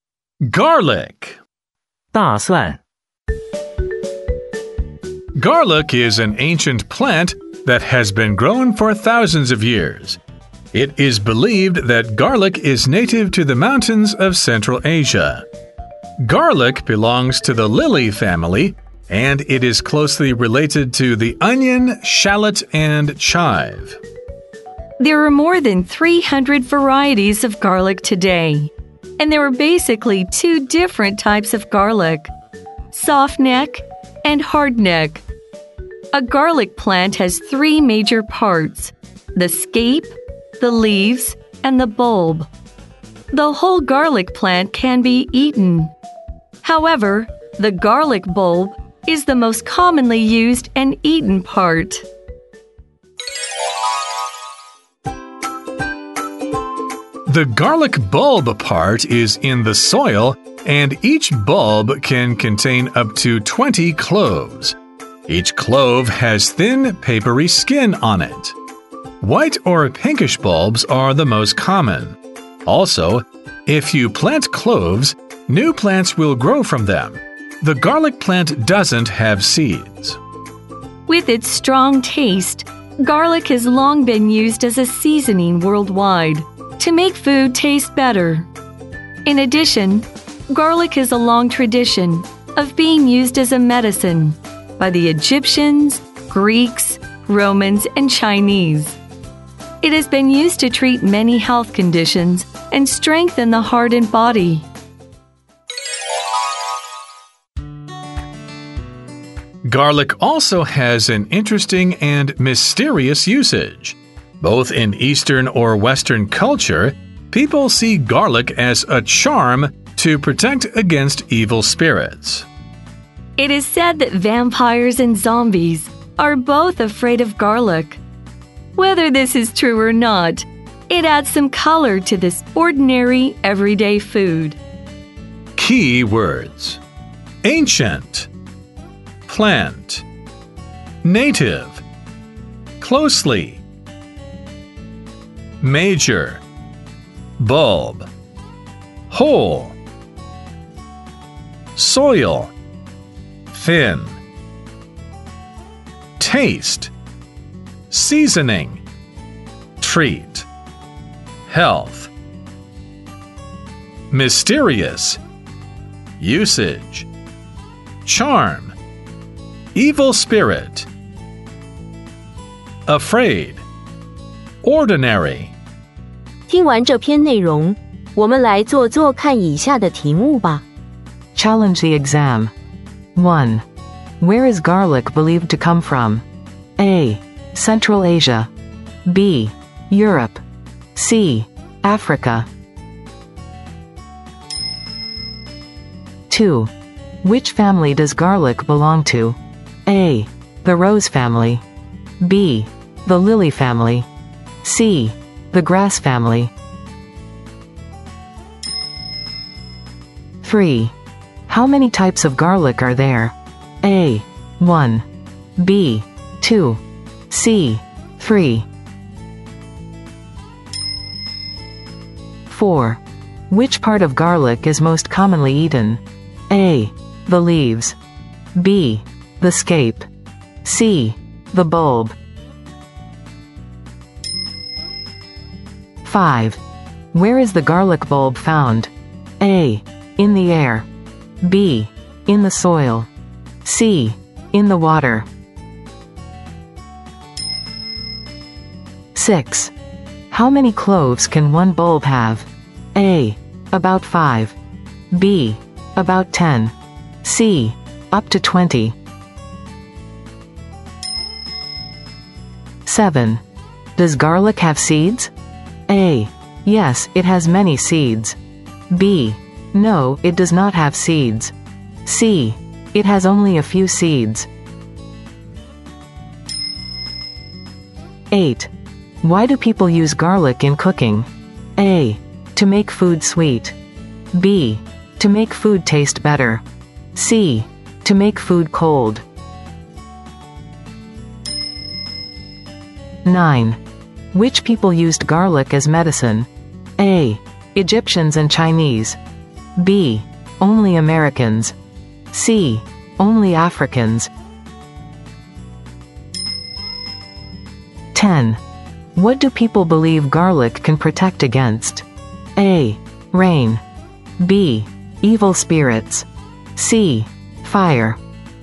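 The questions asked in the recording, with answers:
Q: Where is garlic believed to come from?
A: A: Central Asia.

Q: Which family does garlic belong to?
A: B: The lily family.

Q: How many types of garlic are there?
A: B: 2.

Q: Which part of garlic is most commonly eaten?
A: C: The bulb.

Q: Where is the garlic bulb found?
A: B: In the soil.

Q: How many cloves can one bulb have?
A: C: Up to 20.

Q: Does garlic have seeds?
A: B: No, it does not have seeds.

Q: Why do people use garlic in cooking?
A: B: To make food taste better.

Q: Which people used garlic as medicine?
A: A: Egyptians and Chinese.

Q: What do people believe garlic can protect against?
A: B: Evil spirits.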